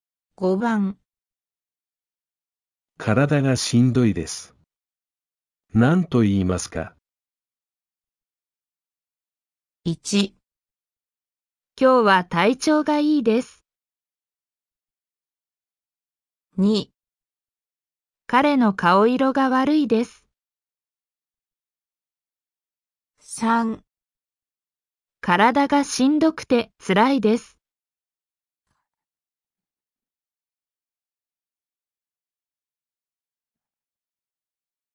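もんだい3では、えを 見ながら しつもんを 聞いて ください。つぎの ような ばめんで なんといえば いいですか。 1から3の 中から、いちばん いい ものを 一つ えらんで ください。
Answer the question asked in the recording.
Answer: 3

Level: N4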